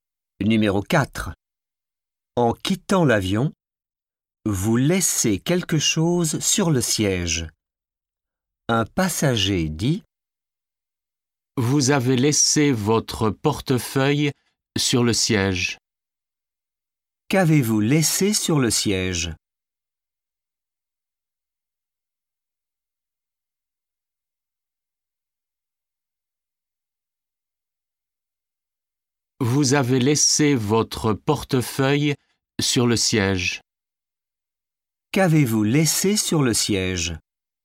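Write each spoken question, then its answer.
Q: Qu'avez-vous laissé sur le siège ?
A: Votre portefeuille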